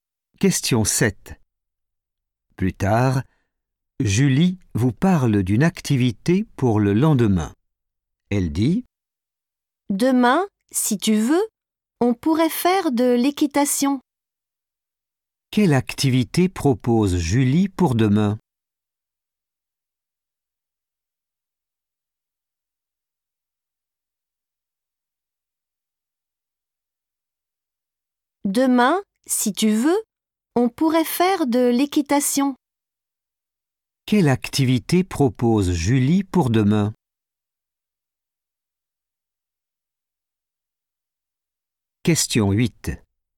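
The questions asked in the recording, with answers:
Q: Quelle activité propose Julie pour demain?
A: de l'équitation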